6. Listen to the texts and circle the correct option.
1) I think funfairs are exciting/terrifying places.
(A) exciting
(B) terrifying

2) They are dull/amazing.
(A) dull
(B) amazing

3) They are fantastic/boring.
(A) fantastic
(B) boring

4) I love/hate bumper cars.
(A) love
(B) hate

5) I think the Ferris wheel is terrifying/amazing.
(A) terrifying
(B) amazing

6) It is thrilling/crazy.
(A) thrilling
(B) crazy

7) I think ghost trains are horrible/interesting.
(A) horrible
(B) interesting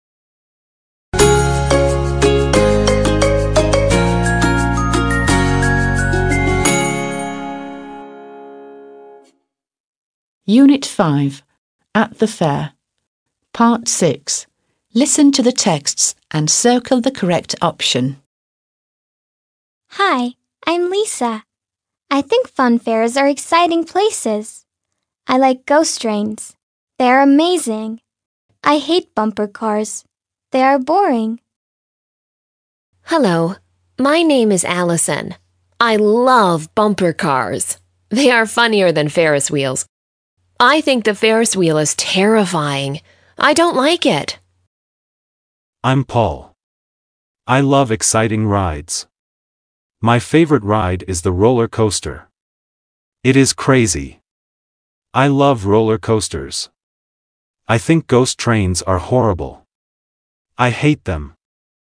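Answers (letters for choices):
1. A
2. B
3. B
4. A
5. A
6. B
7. A

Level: 6. Sınıf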